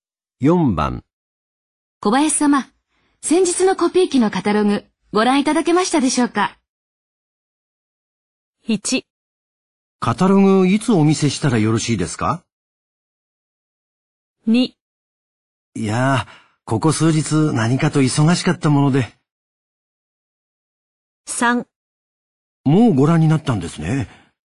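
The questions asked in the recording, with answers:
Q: 小林様、先日のコピー機のカタログ、ご覧いただけましたでしょうか?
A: 2: いやー、ここ数日何かと忙しかったもので。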